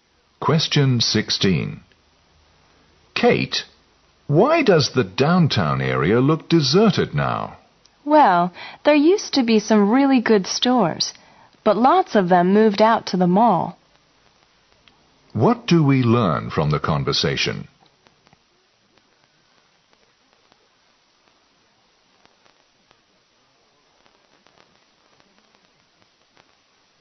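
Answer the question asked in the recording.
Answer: Many downtown stores have moved out to the mall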